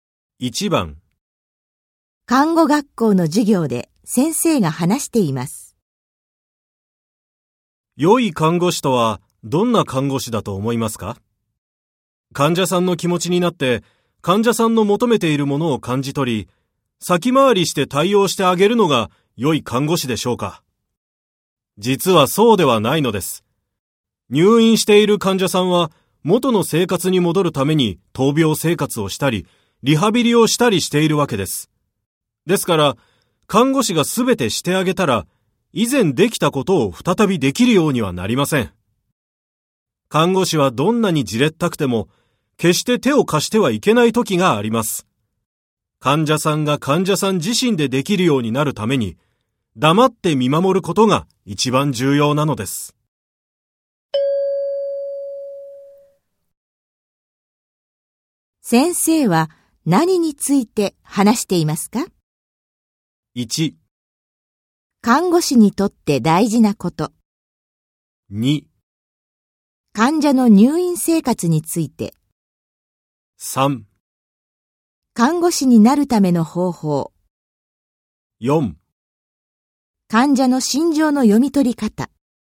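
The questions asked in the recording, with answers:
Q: 先生は何について話していますか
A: 1: 看護師にとって大事なこと。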